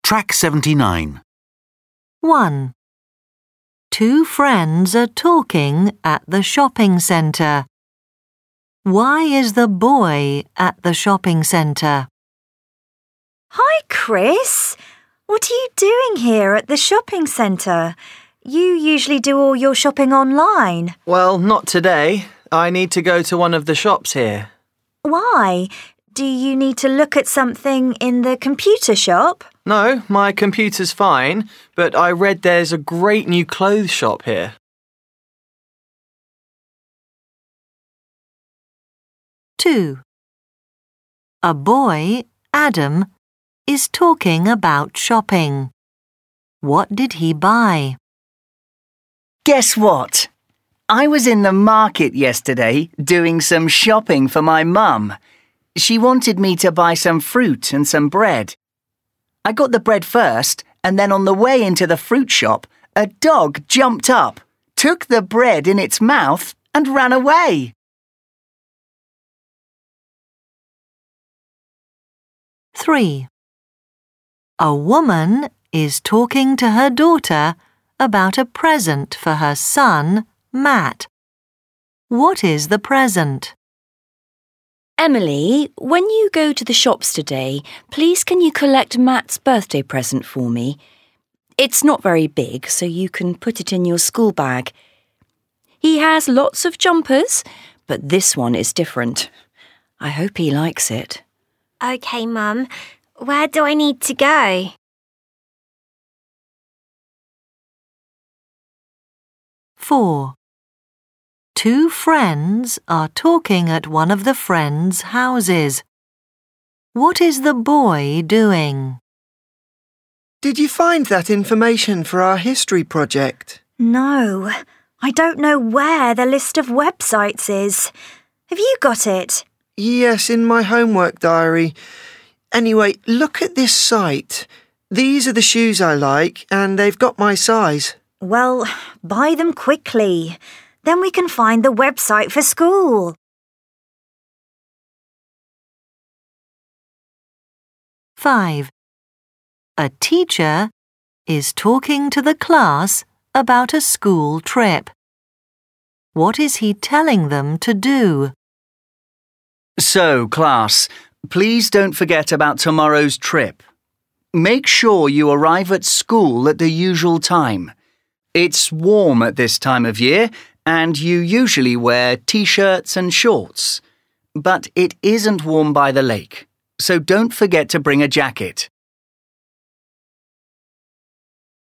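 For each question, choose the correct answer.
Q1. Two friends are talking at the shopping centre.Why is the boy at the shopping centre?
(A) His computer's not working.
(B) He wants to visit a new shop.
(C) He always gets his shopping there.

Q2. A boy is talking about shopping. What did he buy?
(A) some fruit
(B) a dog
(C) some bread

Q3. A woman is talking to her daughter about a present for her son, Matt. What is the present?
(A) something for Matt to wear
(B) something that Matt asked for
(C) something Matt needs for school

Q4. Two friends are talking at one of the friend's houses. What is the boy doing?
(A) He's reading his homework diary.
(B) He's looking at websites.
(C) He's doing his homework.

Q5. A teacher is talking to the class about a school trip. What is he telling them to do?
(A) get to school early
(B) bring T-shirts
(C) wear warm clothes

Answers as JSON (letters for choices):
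{"1": "B", "2": "C", "3": "A", "4": "B", "5": "C"}

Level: 6 класу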